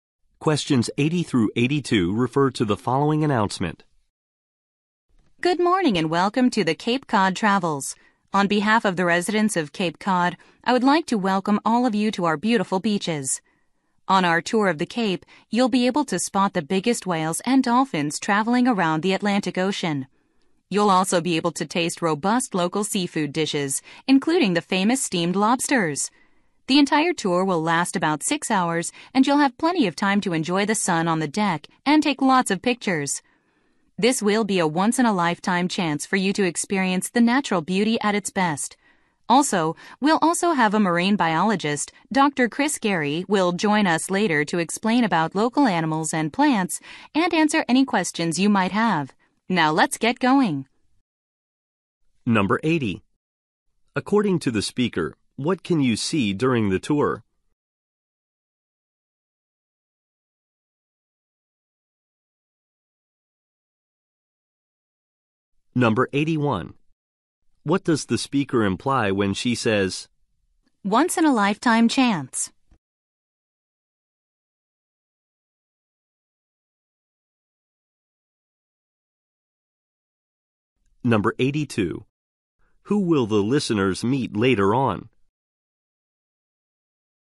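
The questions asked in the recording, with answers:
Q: According to the speaker, what can you see during the tour?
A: Whales and dolphins

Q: Who will the listeners meet later on?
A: A marine biologist, Dr. Chris Gary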